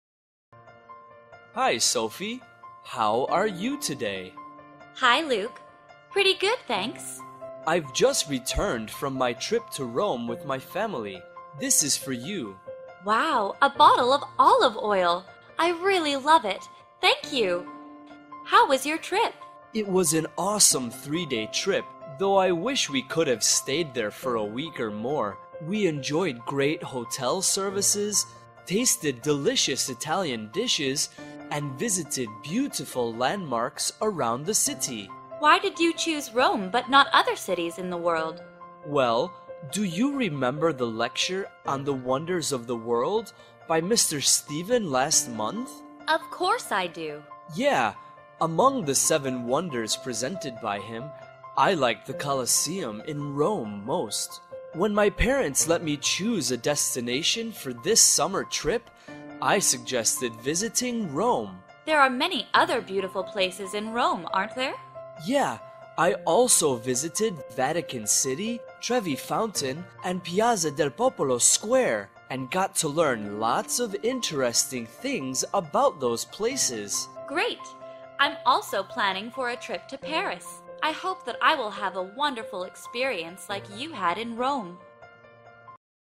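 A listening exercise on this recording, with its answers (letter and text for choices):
Task: Choose the correct answer.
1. Why did Luke choose Rome for his trip?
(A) Because of the Colosseum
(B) Because of his family tradition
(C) Because it was cheap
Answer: (A) Because of the Colosseum

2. What place in Rome did he not mention visiting?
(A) Trevi Fountain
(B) Vatican City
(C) The Louvre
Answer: (C) The Louvre

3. What souvenir did Luke give Sophie?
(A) Olive oil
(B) Perfume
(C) A T-shirt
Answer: (A) Olive oil

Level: lớp 8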